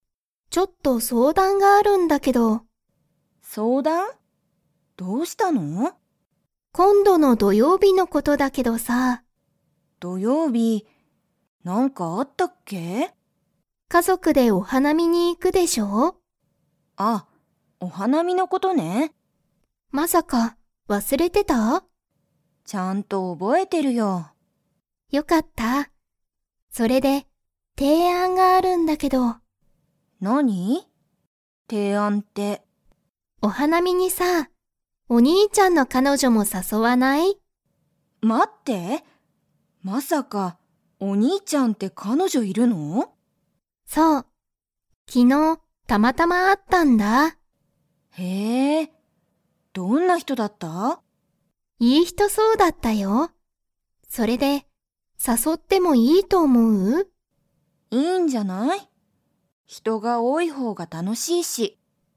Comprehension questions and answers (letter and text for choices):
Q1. アミはいつ、家族(かぞく)でお花見(はなみ)に行(い)きますか?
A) 木曜日(もくようび)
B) 金曜日(きんようび)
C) 土曜日(どようび)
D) 日曜日(にちようび)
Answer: C) 土曜日(どようび)

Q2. 二人(ふたり)のお兄(にい)ちゃんには彼女(かのじょ)が 。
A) いる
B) いない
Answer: A) いる

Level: Level 4